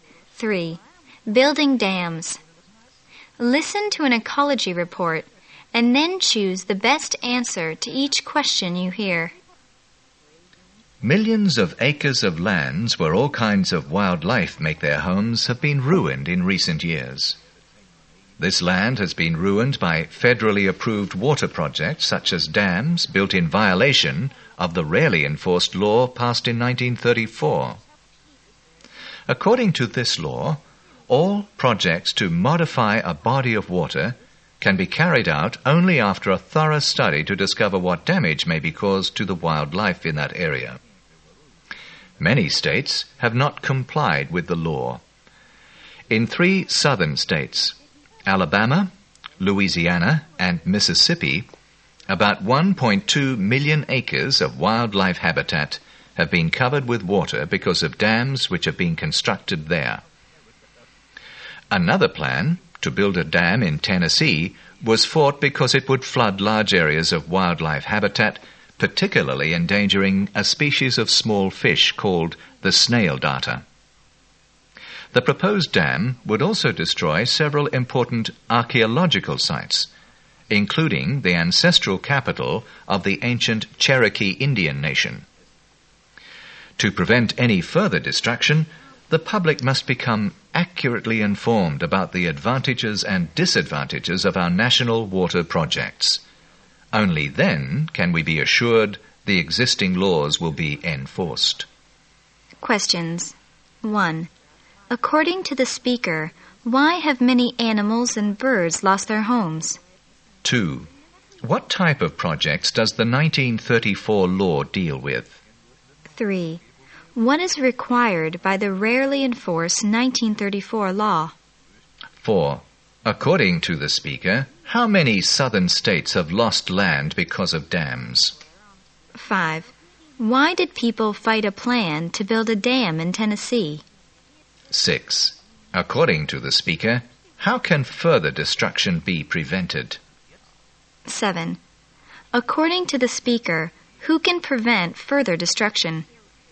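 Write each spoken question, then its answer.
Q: According to the speaker, why have many animals and birds lost their homes?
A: Federally approved water projects such as dams have ruined their land.

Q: What type of projects does the 1934 law deal with?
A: Projects that change a body of water.

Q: What is required by the rarely enforced 1934 law?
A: A thorough study of possible damage to wildlife before the project is carried out.

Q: According to the speaker, how many southern states have lost land because of dams?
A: Three.

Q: Why did people fight a plan to build a dam in Tennessee?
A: It would flood wildlife habitat, put the snail darter in danger and destroy archaeological sites.

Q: According to the speaker, how can further destruction be prevented?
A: The public must be accurately informed about the advantages and disadvantages of water projects.

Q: According to the speaker, who can prevent further destruction?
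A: The public.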